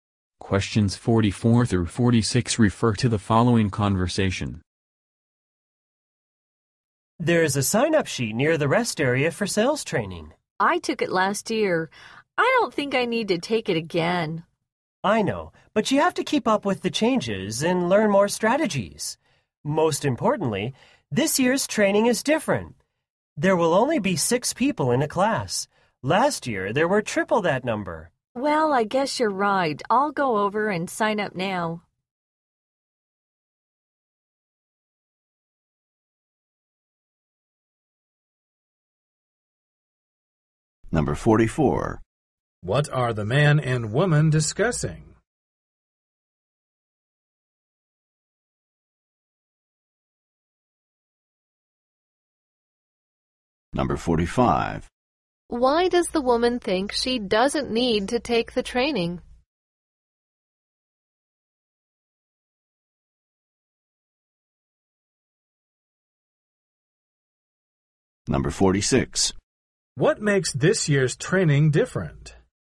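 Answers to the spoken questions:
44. Signing up for sales training
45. She took it last year
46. Only 6 people in a class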